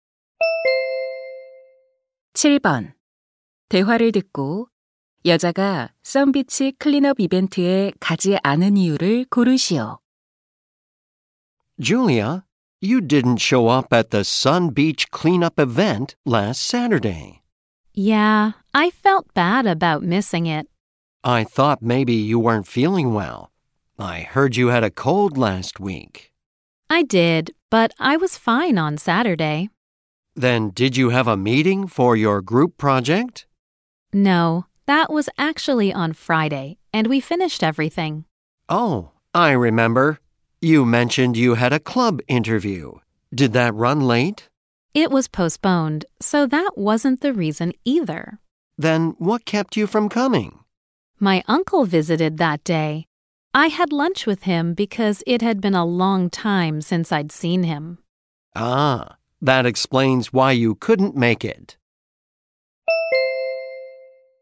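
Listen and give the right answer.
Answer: 삼촌이 방문해서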